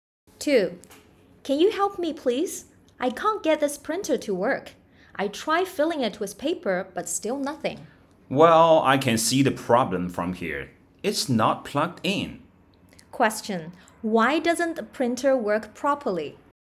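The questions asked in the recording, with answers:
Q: Why doesn't the printer work properly?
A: It isn't plugged in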